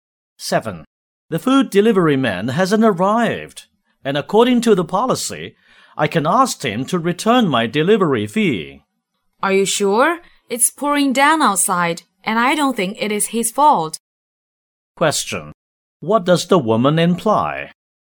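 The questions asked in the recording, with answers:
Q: What does the woman imply?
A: The delivery man is not to blame for the delay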